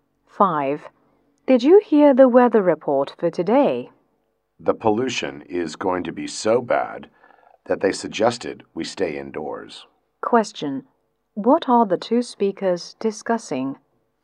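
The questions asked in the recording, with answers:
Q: What are the two speakers discussing?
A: The weather report about bad pollution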